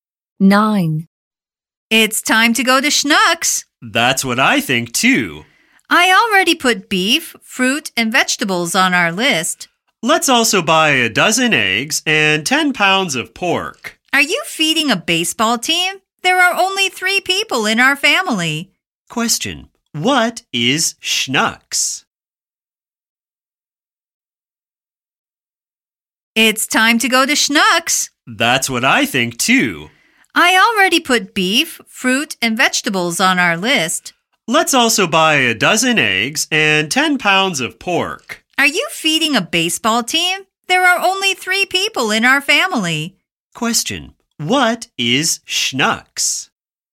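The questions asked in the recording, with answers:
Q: What is Schnucks?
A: A supermarket (grocery store)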